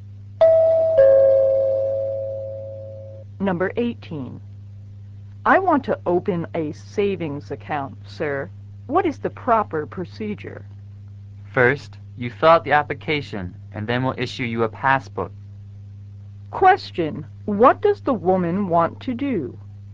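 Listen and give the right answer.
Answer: Open a savings account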